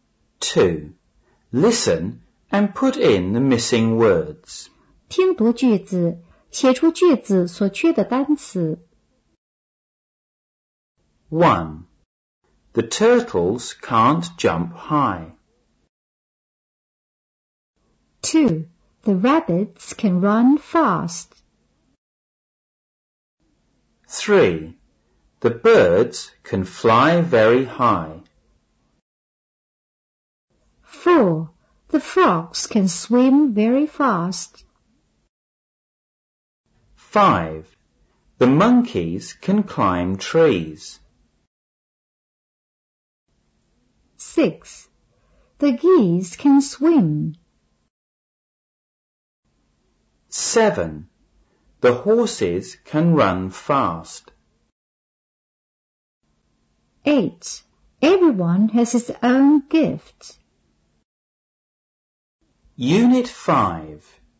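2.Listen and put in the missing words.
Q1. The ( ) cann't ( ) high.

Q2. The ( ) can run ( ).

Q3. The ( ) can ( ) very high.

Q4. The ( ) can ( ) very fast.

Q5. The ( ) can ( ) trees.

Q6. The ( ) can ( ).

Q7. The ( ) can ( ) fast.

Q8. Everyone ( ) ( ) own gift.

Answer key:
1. turtles; jump
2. rabbits; fast
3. birds; fly
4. frogs; swim
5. monkeys; climb
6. geese; swim
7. horses; run
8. has; his

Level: 五年级上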